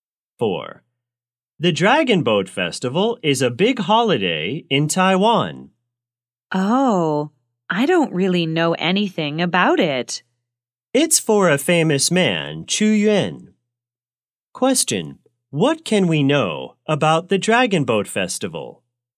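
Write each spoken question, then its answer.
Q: What can we know about the Dragon Boat Festival?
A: It is a big holiday in Taiwan for a famous man, Chu Yuan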